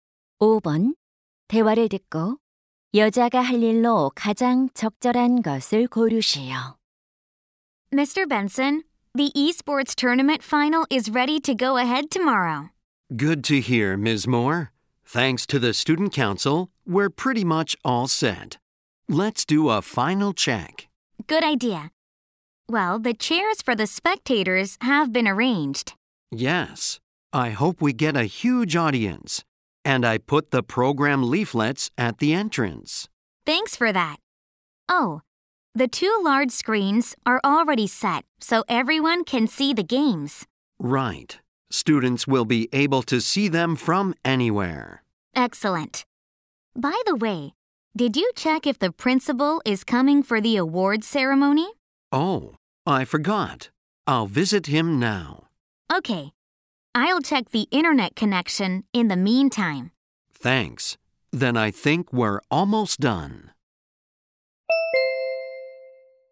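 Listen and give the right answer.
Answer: 인터넷 연결 상태 확인하기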